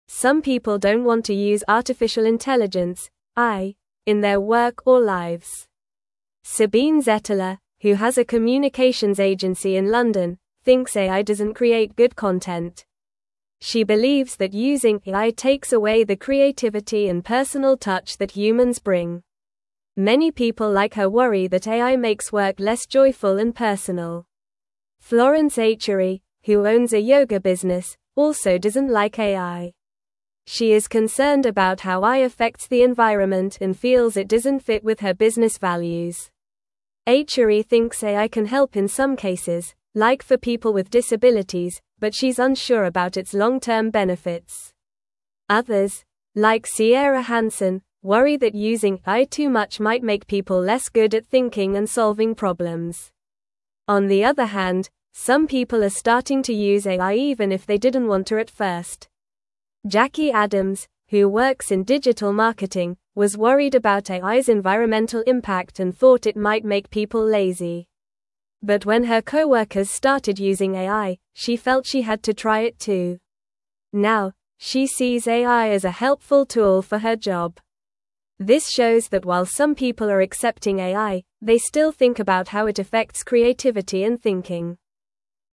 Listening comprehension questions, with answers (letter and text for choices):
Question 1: What does Sabine Zetteler think about AI?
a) It is very helpful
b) It doesn't create good content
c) It is fun to use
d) It makes work easier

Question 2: What is Florence Achery's job?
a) She is a teacher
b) She is a doctor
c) She works in a restaurant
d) She owns a yoga business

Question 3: What does Florence Achery worry about?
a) How AI helps people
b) How AI makes money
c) How AI affects the environment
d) How AI is used in schools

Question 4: What does Jackie Adams do for a living?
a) She is a yoga instructor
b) She is a writer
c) She works in digital marketing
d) She is a scientist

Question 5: Why did Jackie Adams start using AI?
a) She wanted to be lazy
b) She thought it was fun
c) She wanted to create art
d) Her coworkers started using it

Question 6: What do some people think AI does to creativity?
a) It takes away the personal touch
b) It makes it better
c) It has no effect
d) It helps people think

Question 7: What is one positive thing some people think about AI?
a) It is always bad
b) It can help people with disabilities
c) It is not useful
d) It is too complicated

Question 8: How do some people feel about using AI at work?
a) They think about its effects on creativity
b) They think it is boring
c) They think it is a waste of time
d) They think it is always good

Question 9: Some (1)______ don't want to use artificial intelligence (AI) in their work or lives.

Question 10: She believes that using AI takes away the creativity and personal (2)______ that (3)______ bring.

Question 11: She believes that using AI takes away the creativity and personal (2)______ that (3)______ bring.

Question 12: Many people like her worry that AI (4)______ work less joyful and personal.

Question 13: Achery (5)______ AI can help in some cases, like for people with (6)______, but she's unsure about its long-term benefits.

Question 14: Achery (5)______ AI can help in some cases, like for people with (6)______, but she's unsure about its long-term benefits.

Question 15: Others, like Sierra Hansen, worry that using AI too much might make people less (7)______ at thinking and solving problems.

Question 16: On the other hand, some people are (8)______ to use AI even if they didn't want to at first.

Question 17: (9)______ Adams, who works in digital marketing, was worried about AI's environmental (10)______ and (11)______ it might make people lazy.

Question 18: (9)______ Adams, who works in digital marketing, was worried about AI's environmental (10)______ and (11)______ it might make people lazy.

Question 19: (9)______ Adams, who works in digital marketing, was worried about AI's environmental (10)______ and (11)______ it might make people lazy.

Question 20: This shows that while some people are accepting AI, they still think about how it affects (12)______ and thinking.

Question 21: What does Sabine Zetteler think about using artificial intelligence (AI) in her work?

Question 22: Why does Florence Achery feel that AI does not fit with her yoga business?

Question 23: How does Sabine Zetteler believe AI affects creativity?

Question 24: What is one way that Florence Achery thinks AI could be helpful?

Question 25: How did Jackie Adams feel about AI at first?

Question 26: What changed Jackie Adams' mind about using AI for her job?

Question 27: What do some people worry about when it comes to using AI too much?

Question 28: Sabine Zetteler thinks AI creates good content.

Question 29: Florence thinks AI can help people with disabilities.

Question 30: Some people want to use artificial intelligence (AI) in their work or lives.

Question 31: Florence Achery is worried about how AI affects the environment.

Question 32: Jackie stopped using AI because her coworkers used it.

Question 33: Sabine believes AI enhances creativity and adds a personal touch.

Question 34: Jackie Adams was worried about AI making people lazy.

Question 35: Some people see AI as a helpful tool for their jobs.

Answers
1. b) It doesn't create good content
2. d) She owns a yoga business
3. c) How AI affects the environment
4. c) She works in digital marketing
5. d) Her coworkers started using it
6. a) It takes away the personal touch
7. b) It can help people with disabilities
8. a) They think about its effects on creativity
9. people
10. touch
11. humans
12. makes
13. thinks
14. disabilities
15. good
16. starting
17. Jackie
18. impact
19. thought
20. creativity
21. She thinks AI does not create good content and takes away creativity.
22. She feels it does not match her business values and is worried about its impact on the environment.
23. She believes that AI makes work less joyful and personal, taking away the human touch.
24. She thinks AI could help people with disabilities.
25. She was worried about AI's environmental impact and thought it might make people lazy.
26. Her coworkers started using AI, so she decided to try it too.
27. They worry that it might make people less good at thinking and solving problems.
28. False
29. True
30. False
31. True
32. False
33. False
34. True
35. True

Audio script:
Some people don't want to use artificial intelligence (AI) in their work or lives. Sabine Zetteler, who has a communications agency in London, thinks AI doesn't create good content. She believes that using AI takes away the creativity and personal touch that humans bring. Many people like her worry that AI makes work less joyful and personal.
Florence Achery, who owns a yoga business, also doesn't like AI. She is concerned about how AI affects the environment and feels it doesn't fit with her business values. Achery thinks AI can help in some cases, like for people with disabilities, but she's unsure about its long-term benefits. Others, like Sierra Hansen, worry that using AI too much might make people less good at thinking and solving problems.
On the other hand, some people are starting to use AI even if they didn't want to at first. Jackie Adams, who works in digital marketing, was worried about AI's environmental impact and thought it might make people lazy. But when her coworkers started using AI, she felt she had to try it too. Now, she sees AI as a helpful tool for her job. This shows that while some people are accepting AI, they still think about how it affects creativity and thinking.

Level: Level 2